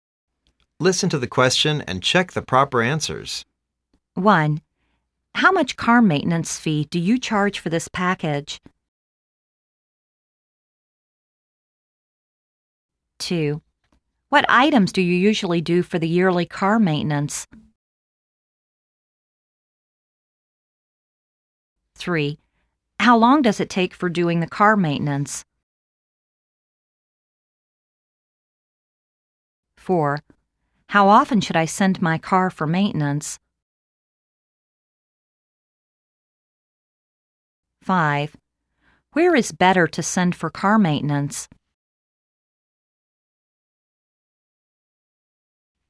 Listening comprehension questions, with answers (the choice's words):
Listen to the questions and check the proper answers.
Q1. How much car maintenance fee do you charge for this package?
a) 350 US dollars including tax.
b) 7 hours per day.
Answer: 350 US dollars including tax.

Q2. What items do you usually do for the yearly car maintenance?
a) Wheels balancing and alignment, oil change.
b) Fill up the gas tank with petrol.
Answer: Wheels balancing and alignment, oil change.

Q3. How long does it take for doing the car maintenance?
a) 3 days.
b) Every 3 years.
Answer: 3 days.

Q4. How often should I send my car for maintenance?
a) Every car.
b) Every year.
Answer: Every year.

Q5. Where is better to send for car maintenance?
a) The end of the year.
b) The car authorized distributor.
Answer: The car authorized distributor.